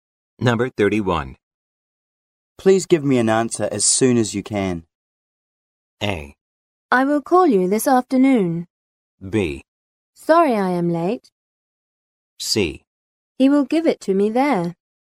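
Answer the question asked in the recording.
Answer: A: I will call you this afternoon.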